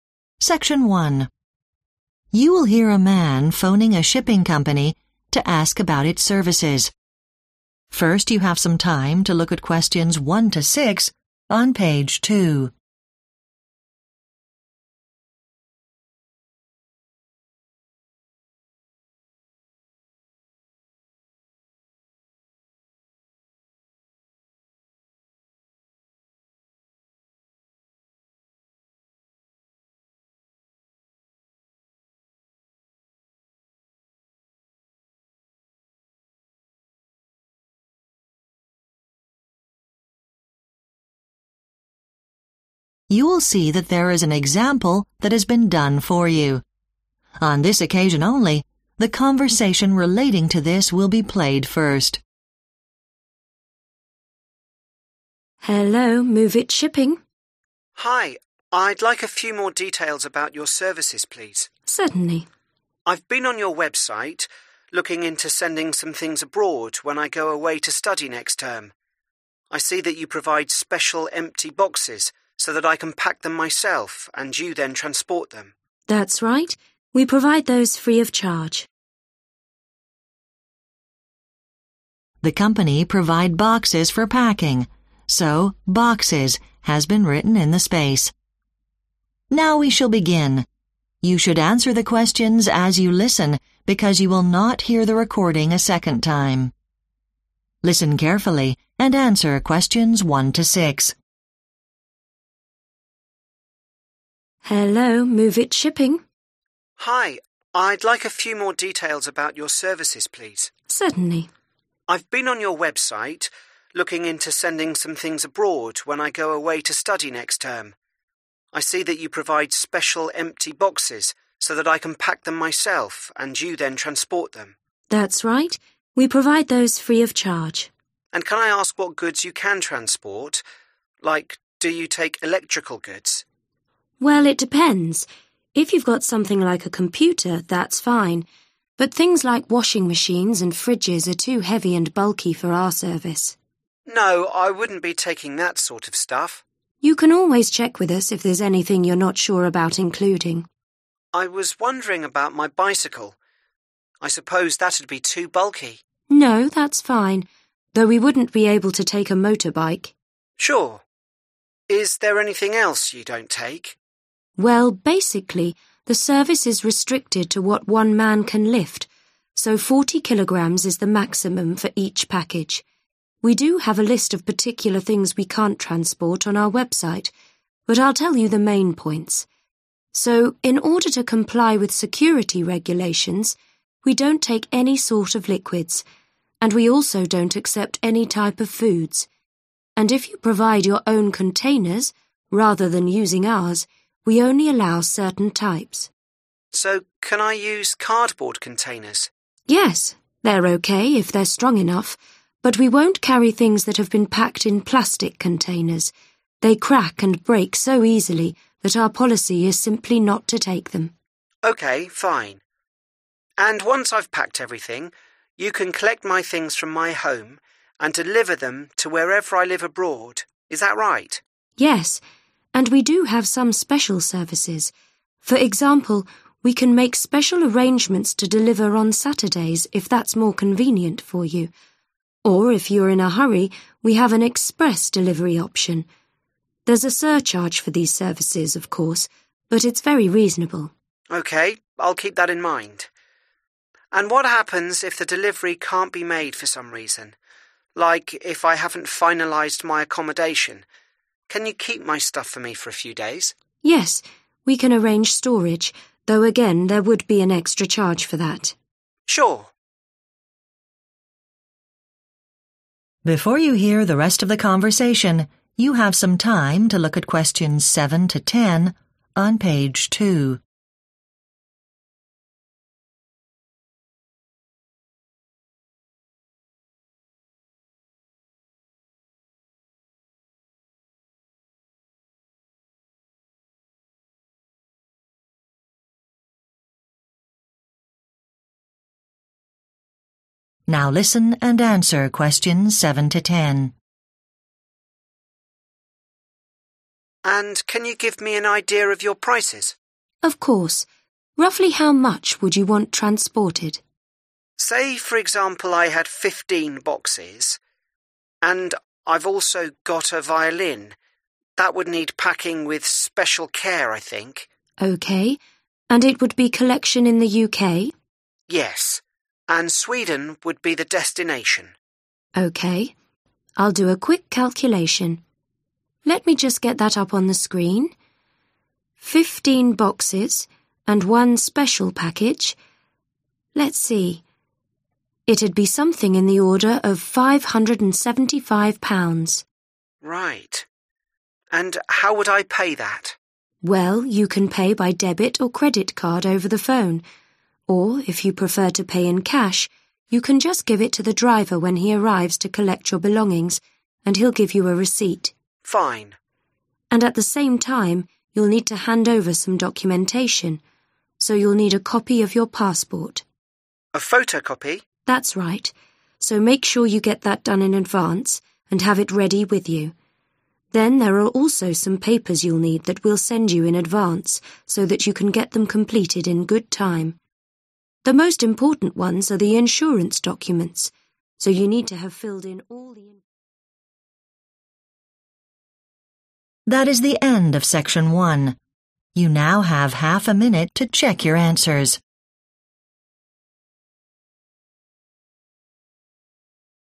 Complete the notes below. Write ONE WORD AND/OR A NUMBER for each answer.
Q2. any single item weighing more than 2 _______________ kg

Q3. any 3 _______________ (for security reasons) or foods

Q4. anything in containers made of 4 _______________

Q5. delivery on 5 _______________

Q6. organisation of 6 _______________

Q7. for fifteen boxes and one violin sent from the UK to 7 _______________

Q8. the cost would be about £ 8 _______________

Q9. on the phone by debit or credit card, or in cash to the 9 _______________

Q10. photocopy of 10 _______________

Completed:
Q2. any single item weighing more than 40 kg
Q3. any liquids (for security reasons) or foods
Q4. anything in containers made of plastic
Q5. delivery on Saturdays
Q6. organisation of storage
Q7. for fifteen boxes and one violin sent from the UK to Sweden
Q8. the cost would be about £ 575
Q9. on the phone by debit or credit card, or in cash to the driver
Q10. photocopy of passport